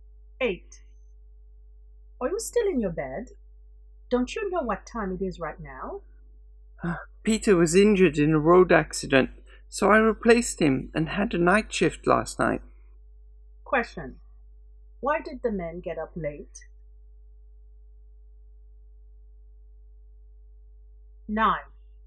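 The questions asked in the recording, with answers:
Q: why did the man get up late?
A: He worked a night shift replacing the injured Peter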